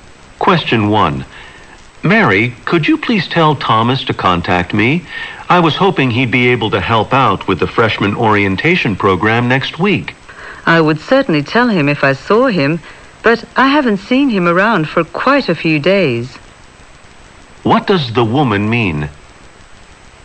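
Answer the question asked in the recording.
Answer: She hasn't seen Thomas for several days, so she can't pass on the message right now.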